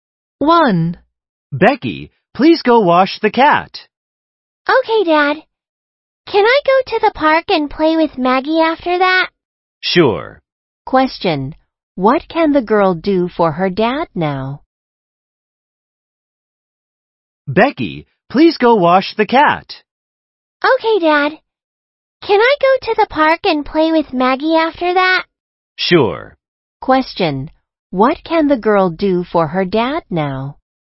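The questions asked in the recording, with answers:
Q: What can the girl do for her dad now?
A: Wash the cat.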